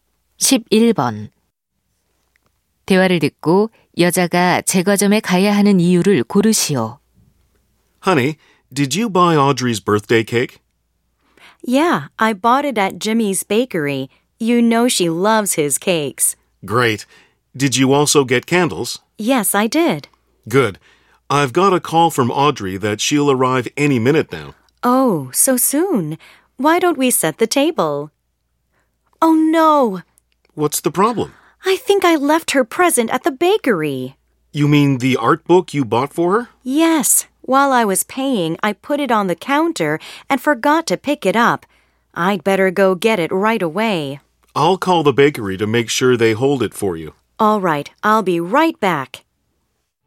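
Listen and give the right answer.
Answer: 두고 온 선물(미술책)을 찾으러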